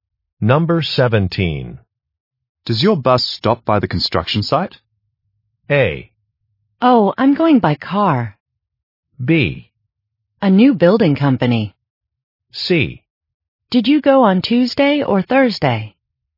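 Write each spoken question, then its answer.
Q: Does your bus stop by the construction site?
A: A: Oh, I'm going by car.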